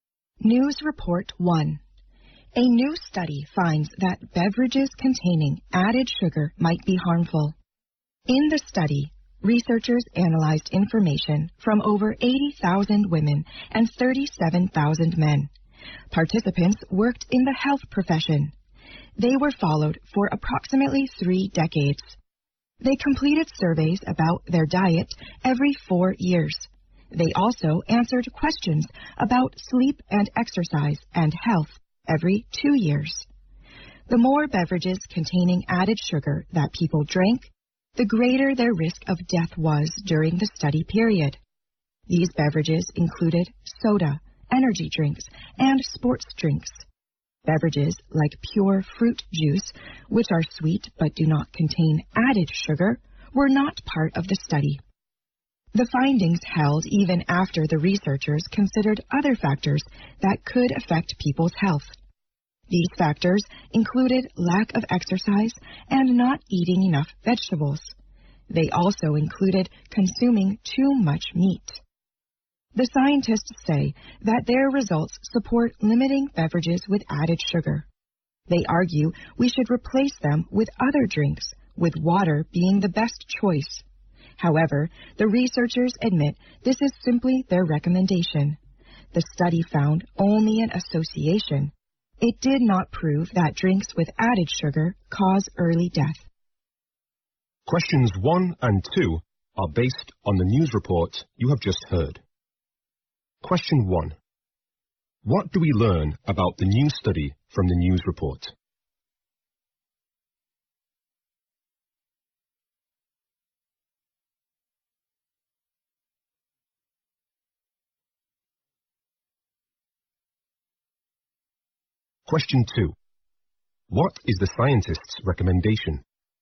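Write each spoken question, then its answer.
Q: What do we learn about the new study from the news report?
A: It found that drinking beverages with added sugar is linked to a higher risk of death.

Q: What is the scientist's recommendation?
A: Limit drinks with added sugar and drink water instead.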